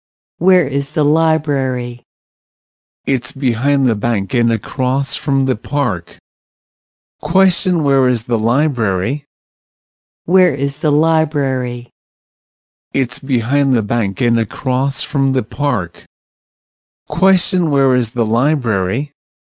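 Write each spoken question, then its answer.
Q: Question, where is the library?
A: Behind the bank and across from the park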